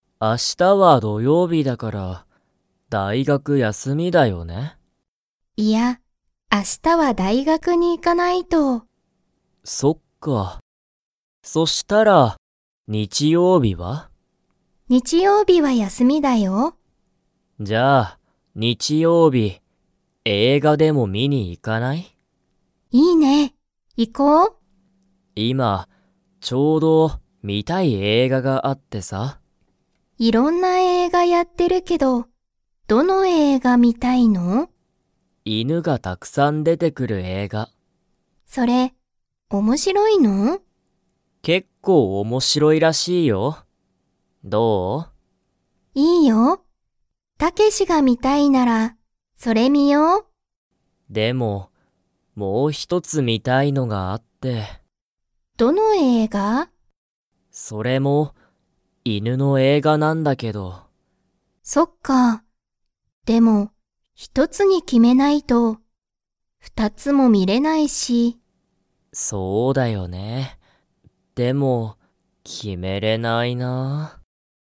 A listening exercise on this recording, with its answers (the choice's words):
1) 明日あした、リカの大学だいがくは休やすみですか?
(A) はい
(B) いいえ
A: いいえ

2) タケシは、____映画えいがが観みたい。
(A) 大学だいがくでやっている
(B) 今いまちょうど休やすみの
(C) 犬いぬがたくさん出でてくる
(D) リカが観みたい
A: 犬いぬがたくさん出でてくる

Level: Level 2